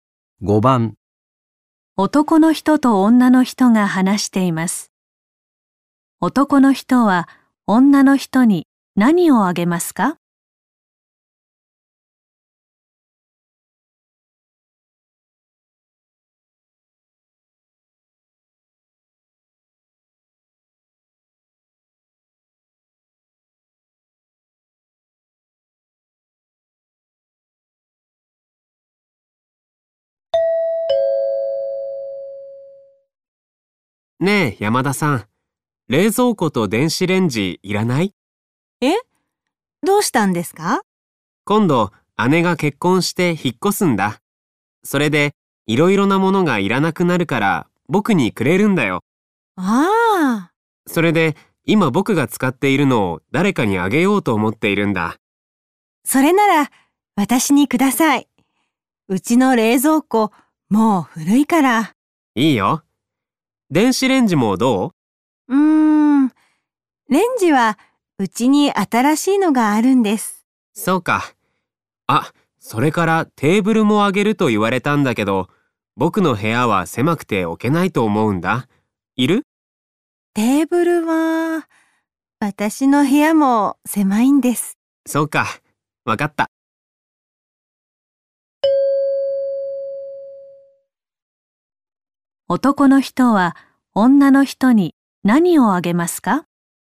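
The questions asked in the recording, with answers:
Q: 男の人は女の人に何をあげますか?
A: 冷蔵庫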